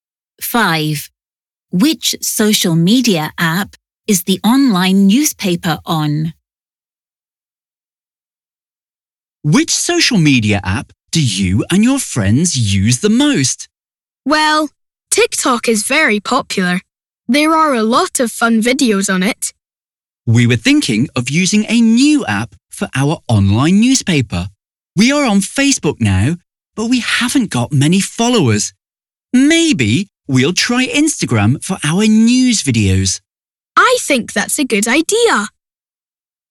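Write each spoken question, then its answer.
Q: Which social media app is the online newspaper on?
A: Facebook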